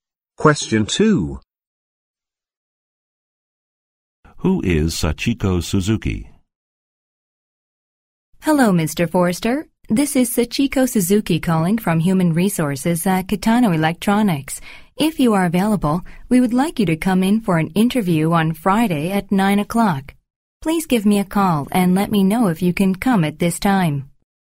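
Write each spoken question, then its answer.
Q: Who is Sachiko Suzuki?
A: Someone from Human Resources at Kitano Electronics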